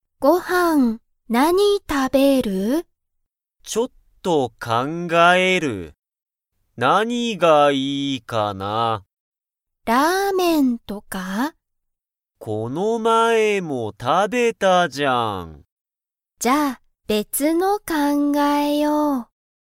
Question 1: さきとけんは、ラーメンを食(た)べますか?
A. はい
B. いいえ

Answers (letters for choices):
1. B

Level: Level 1